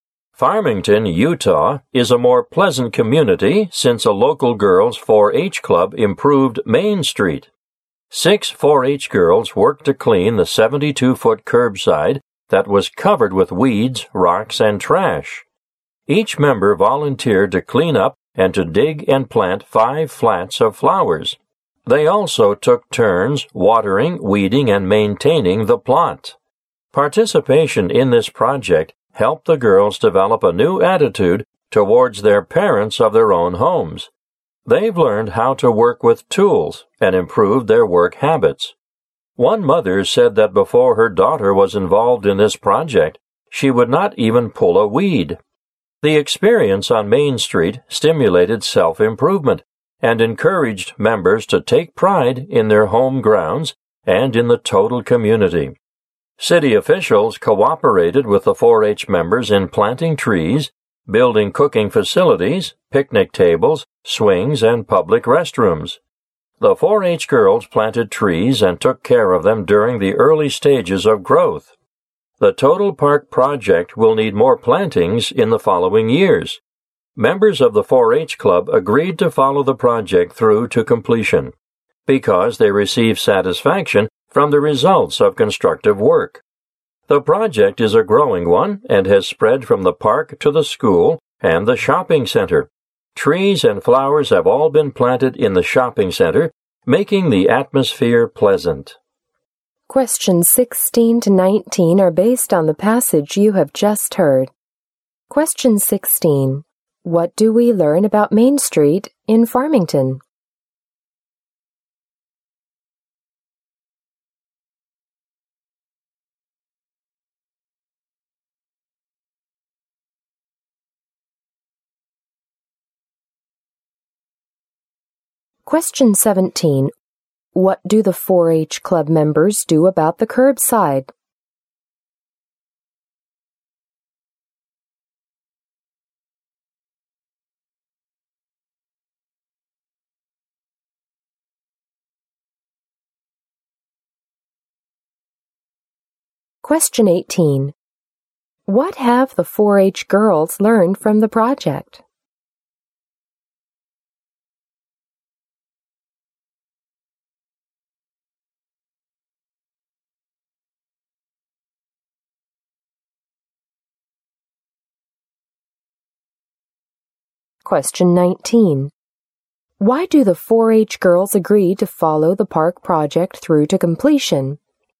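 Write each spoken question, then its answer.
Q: What do we learn about Main Street in Farmington?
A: It was improved by a local girls' 4-H club.

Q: What do the 4-H Club members do about the curbside?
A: They cleaned it up and planted flowers.

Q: What have the 4-H girls learned from the project?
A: How to work with tools, and better work habits.

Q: Why do the 4-H girls agree to follow the park project through to completion?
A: They got satisfaction from the results of constructive work.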